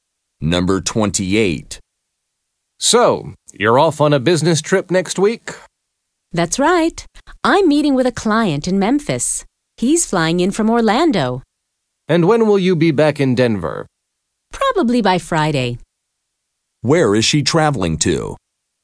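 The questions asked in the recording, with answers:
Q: Where is she traveling to?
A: Memphis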